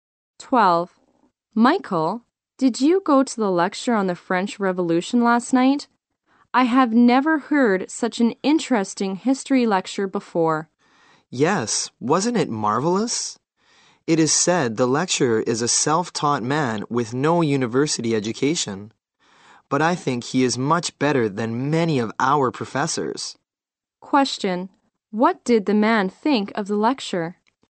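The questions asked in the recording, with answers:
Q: Question, what did the man think of the lecture?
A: It was marvelous, better than many professors' lectures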